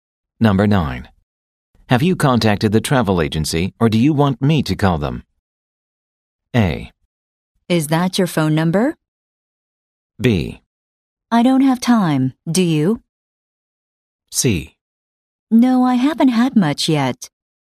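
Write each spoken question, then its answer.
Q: Have you contacted the travel agency or do you want me to call them?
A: B: I don't have time, do you?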